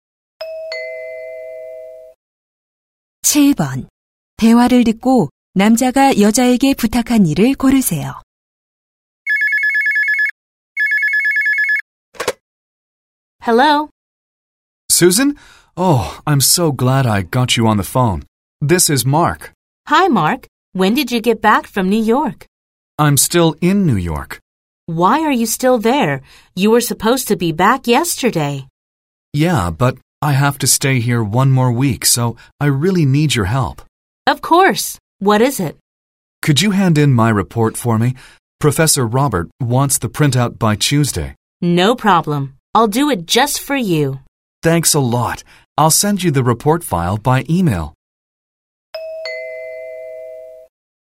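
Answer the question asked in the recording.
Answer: 보고서 대신 제출하기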